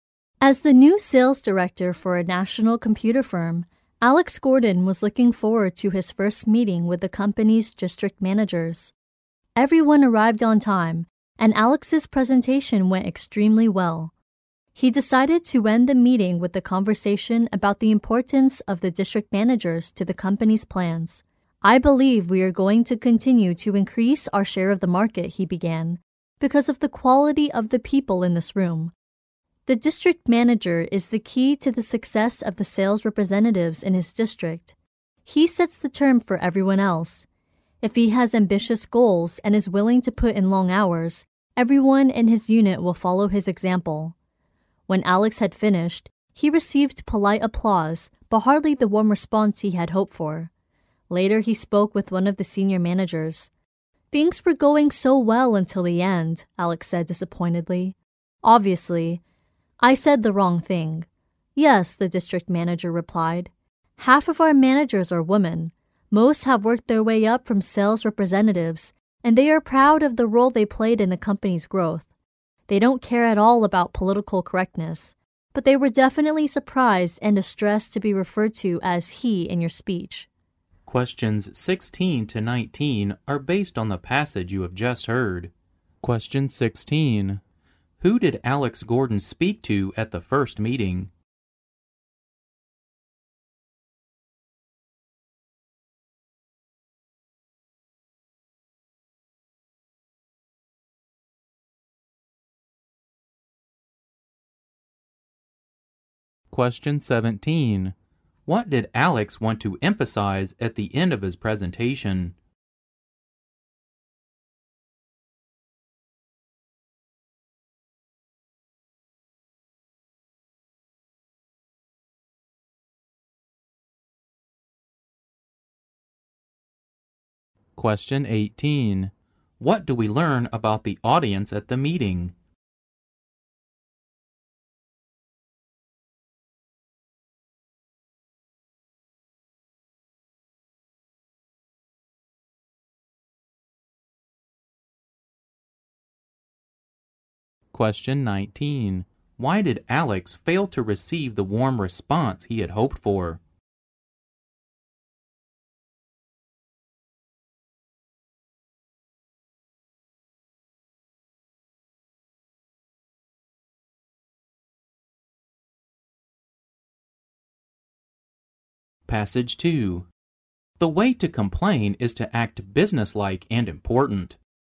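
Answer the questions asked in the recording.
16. The company's district managers.
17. How important the district managers are to the company's plans.
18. Half of them were women.
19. He referred to the managers as "he", which upset the women.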